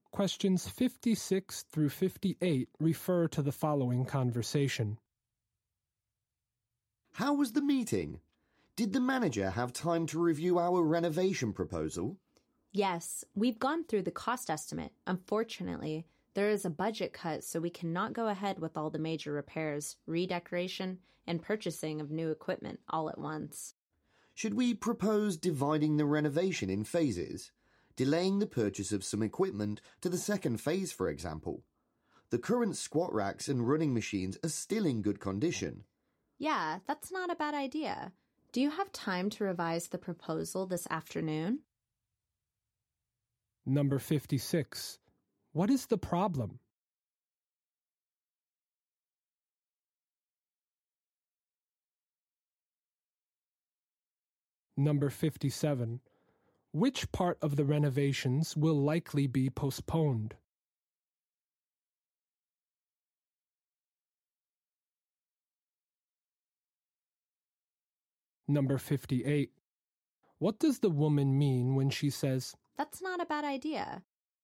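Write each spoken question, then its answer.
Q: What is the problem?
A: There is a budget cut.

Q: Which part of the renovations will likely be postponed?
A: Purchasing some new equipment

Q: What does the woman mean when she says,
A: She agrees with the suggestion to do the renovation in phases.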